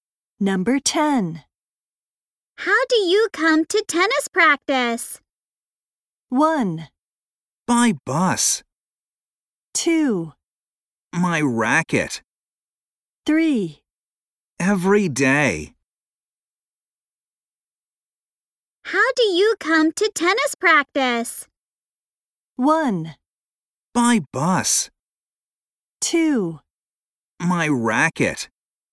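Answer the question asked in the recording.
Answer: 1: By bus.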